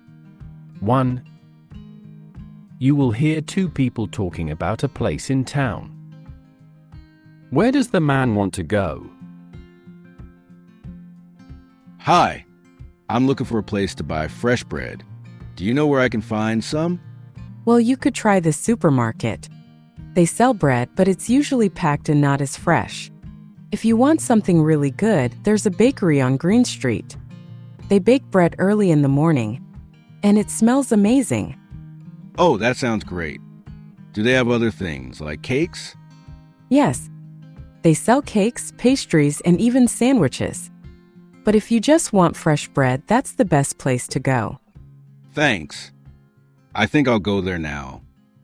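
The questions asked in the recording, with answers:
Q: Where does the man want to go?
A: the bakery on Green Street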